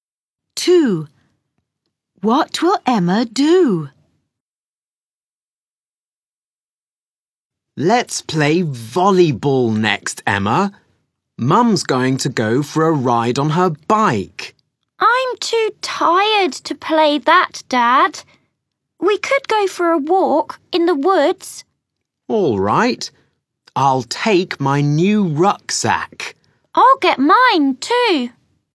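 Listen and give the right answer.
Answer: go for a walk in the woods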